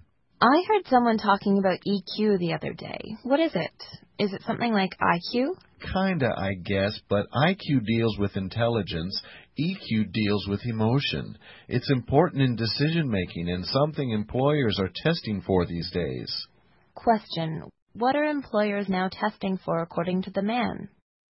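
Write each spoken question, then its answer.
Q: What are employers now testing for according to the man?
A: EQ, the ability to use emotion in decision-making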